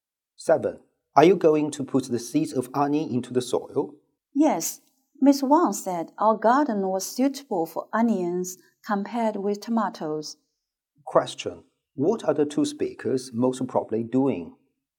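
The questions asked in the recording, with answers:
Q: What are the two speakers most probably doing?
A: Planting onions in the garden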